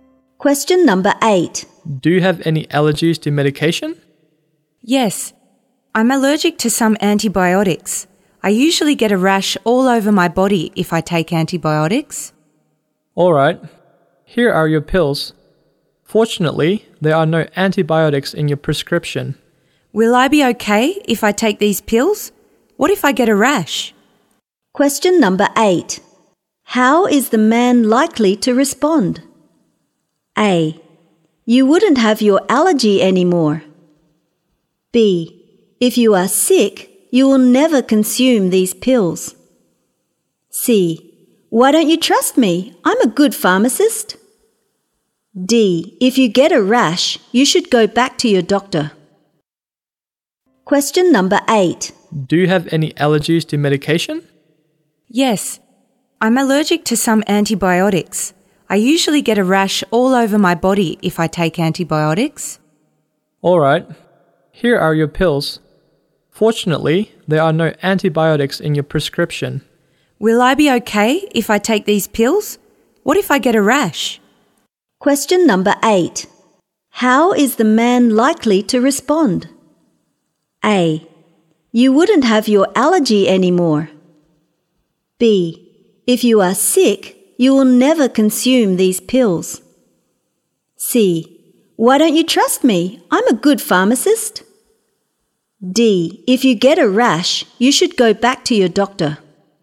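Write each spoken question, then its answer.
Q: How is the man likely to respond?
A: D: If you get a rash, you should go back to your doctor.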